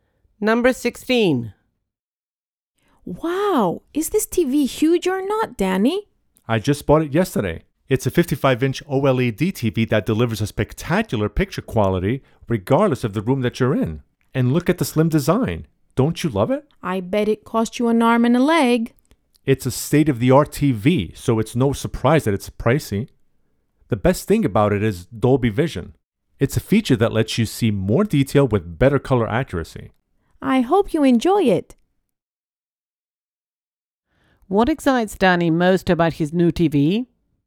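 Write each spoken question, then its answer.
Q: What excites Danny most about his new TV?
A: Dolby Vision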